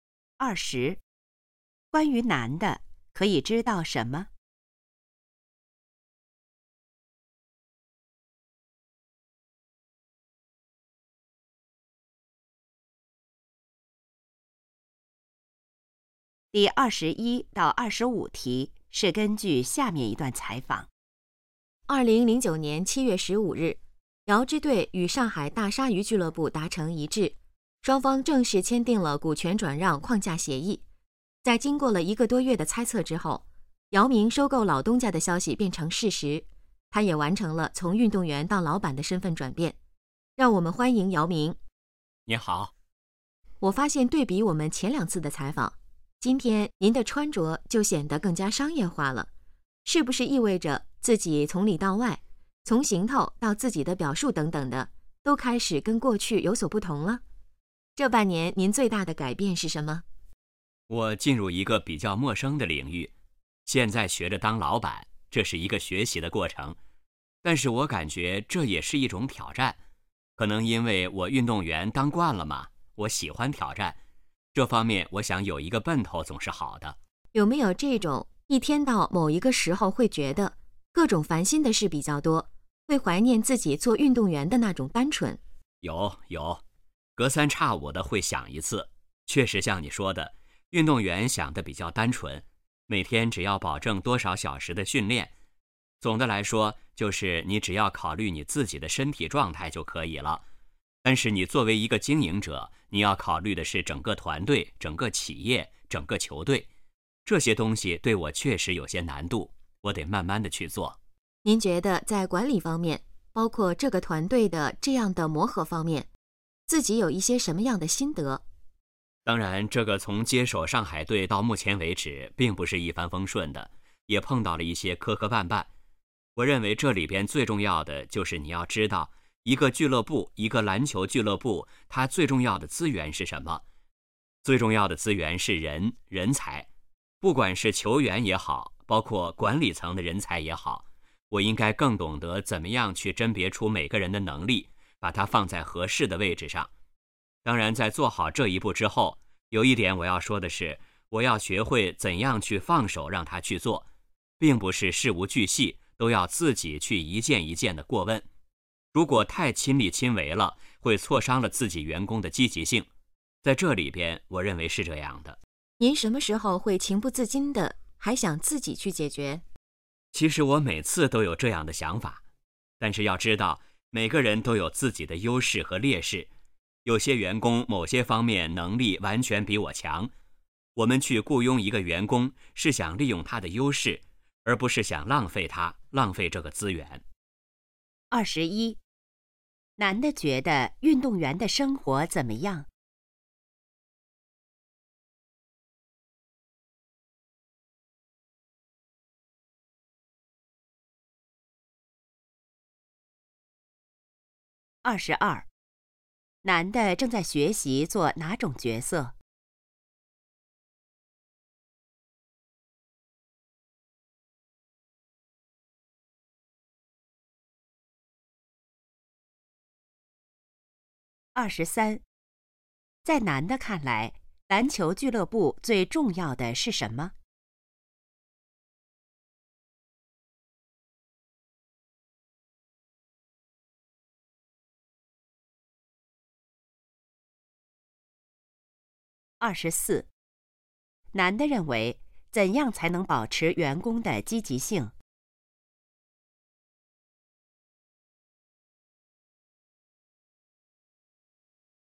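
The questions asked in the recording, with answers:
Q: 男的觉得运动员的生活怎么样?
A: 比较单纯

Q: 男的正在学习做哪种角色?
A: 老板

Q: 在男的看来,篮球俱乐部最重要的是什么?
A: 人才

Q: 男的认为怎样才能保持员工的积极性?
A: 学会放手让员工去做,不要事无巨细亲力亲为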